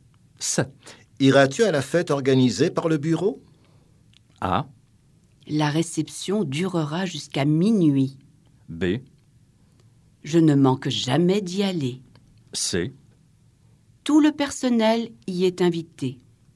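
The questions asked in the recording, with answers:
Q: Iras-tu à la fête organisée par le bureau?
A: B: Je ne manque jamais d'y aller.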